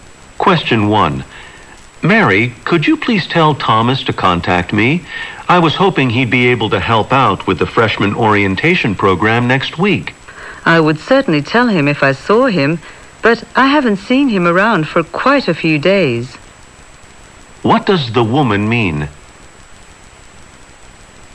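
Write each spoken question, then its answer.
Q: What does the woman mean?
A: She hasn't seen Thomas for several days.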